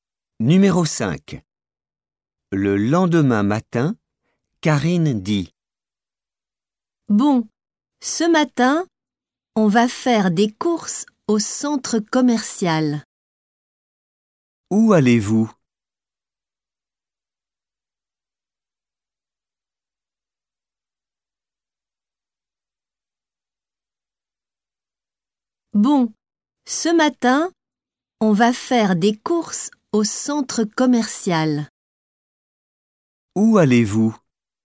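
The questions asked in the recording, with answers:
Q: Où allez-vous?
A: Au centre commercial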